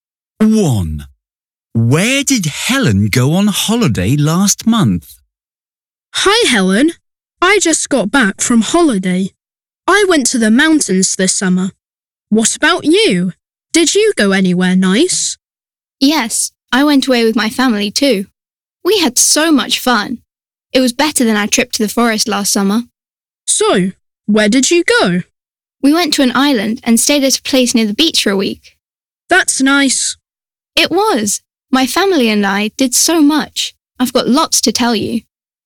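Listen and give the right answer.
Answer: to an island (near the beach)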